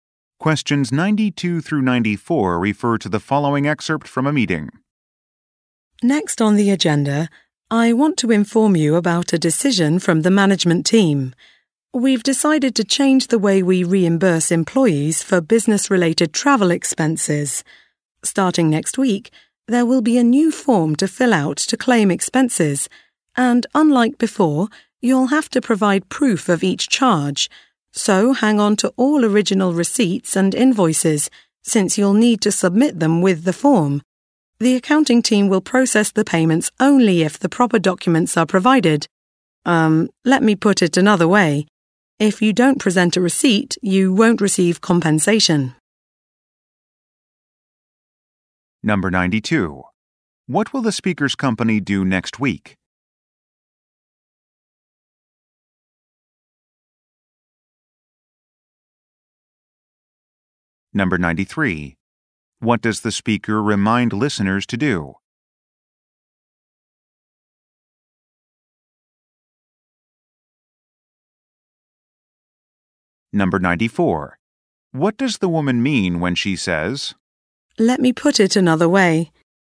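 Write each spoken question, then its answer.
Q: What will the speaker's company do next week?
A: Introduce a new expense claim form

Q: What does the speaker remind listeners to do?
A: Keep original receipts and invoices

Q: What does the woman mean when she says,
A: She will restate the point more clearly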